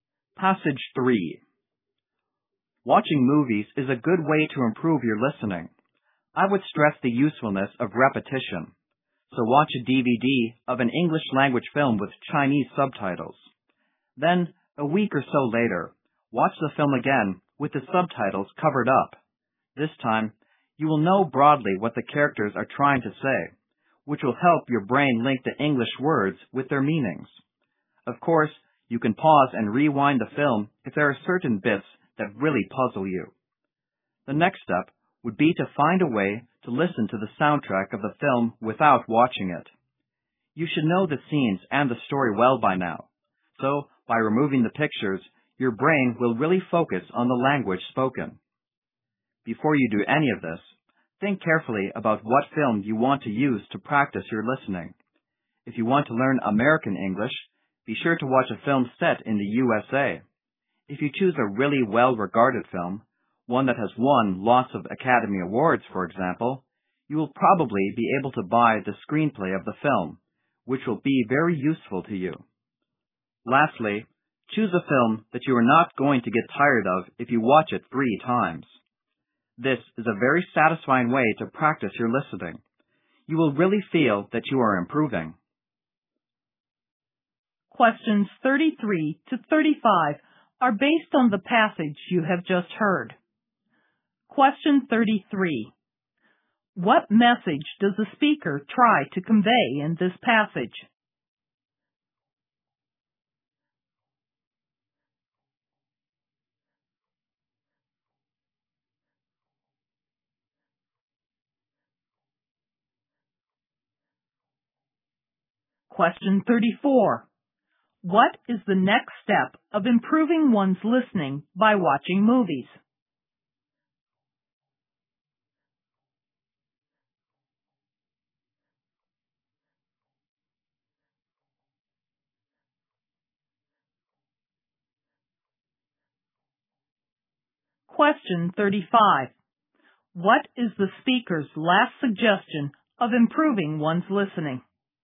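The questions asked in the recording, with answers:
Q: What message does the speaker try to convey in this passage?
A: Watching movies is a good way to improve listening

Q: What is the next step of improving one's listening by watching movies?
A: Listen to the soundtrack without watching the film

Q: What is the speaker's last suggestion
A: Choose a film you won't get tired of watching three times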